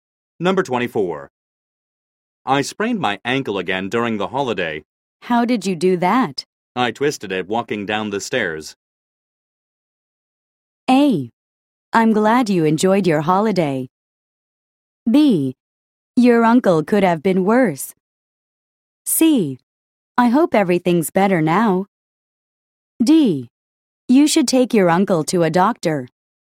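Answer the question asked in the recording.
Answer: C: I hope everything's better now.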